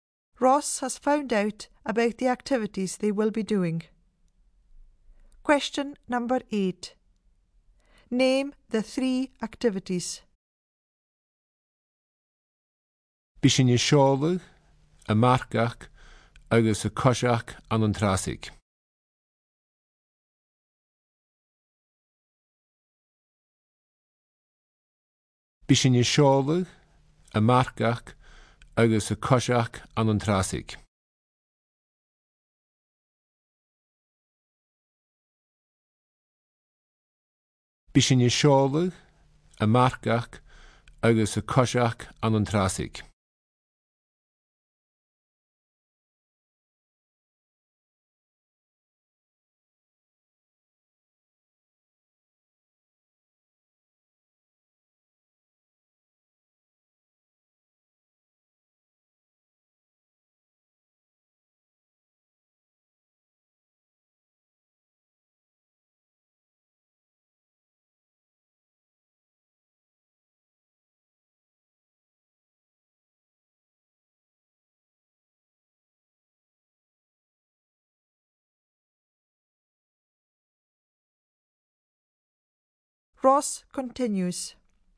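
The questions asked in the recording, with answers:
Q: Name the three activities.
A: Sailing, horse riding and walking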